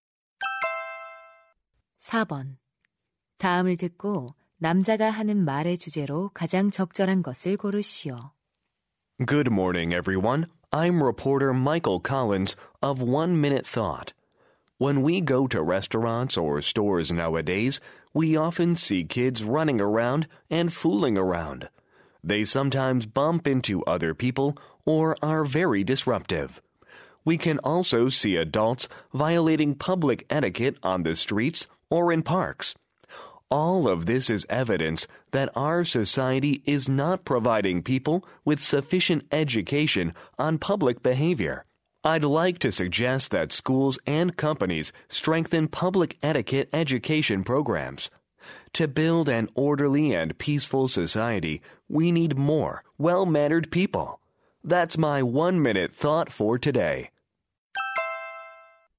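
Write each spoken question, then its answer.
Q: 다음을 듣고 남자가 하는 말의 주제로 가장 적절한 것을 고르시오.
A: 학교와 회사에서 공공 예절 교육을 강화해야 한다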